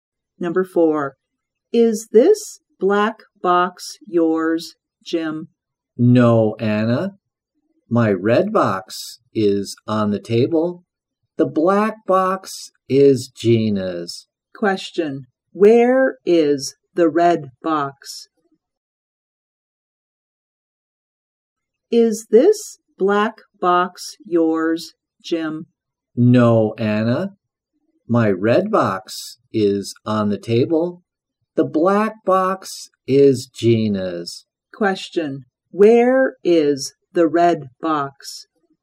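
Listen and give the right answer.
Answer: On the table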